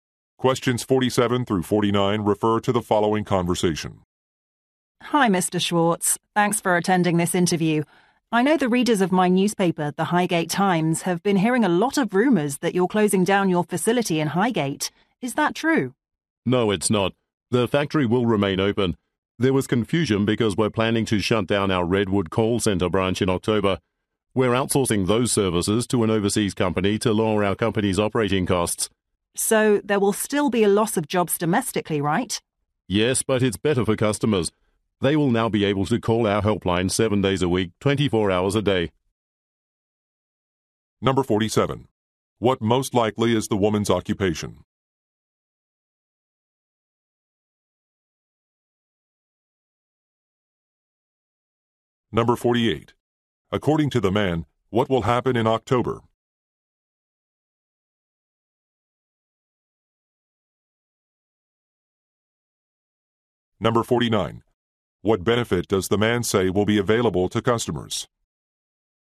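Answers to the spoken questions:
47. Journalist
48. A call center branch will close
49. A 24-hour, 7-day helpline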